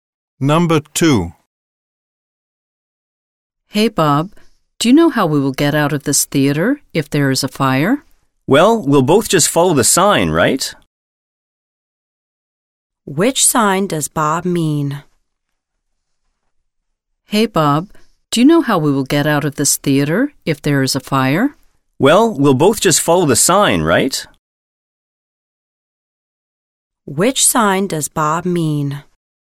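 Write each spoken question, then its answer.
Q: Which sign does Bob mean?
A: The exit sign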